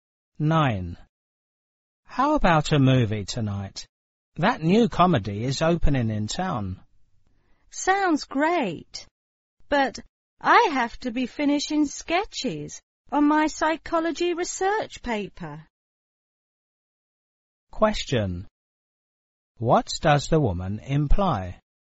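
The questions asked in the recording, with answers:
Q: What does the woman imply?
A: She can't go because she must work on her psychology paper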